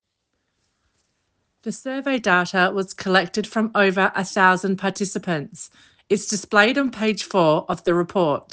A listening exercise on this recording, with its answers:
Answer the following questions. Write NO MORE THAN TWO WORDS AND/OR A NUMBER for each answer.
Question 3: Where can the data from the survey be found?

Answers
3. four

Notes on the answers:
It's displayed on page four of the report.